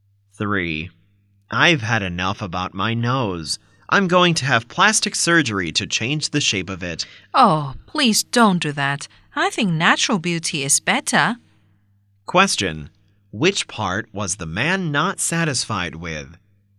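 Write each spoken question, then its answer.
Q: Which part was the man not satisfied with?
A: His nose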